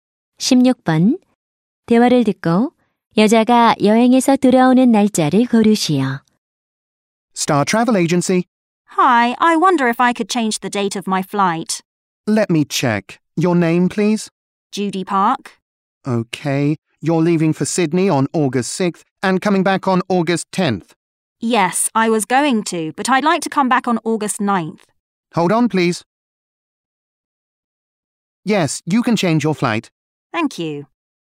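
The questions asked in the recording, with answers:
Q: 대화를 듣고 여자가 여행에서 돌아오는 날짜를 고르시오.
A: 8월 9일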